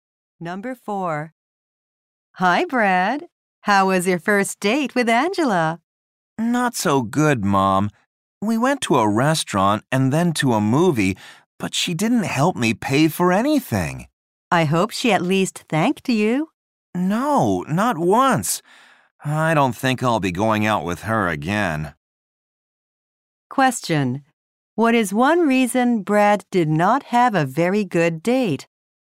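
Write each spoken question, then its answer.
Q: What is one reason Brad did not have a very good date?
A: Angela didn't help pay and never thanked him.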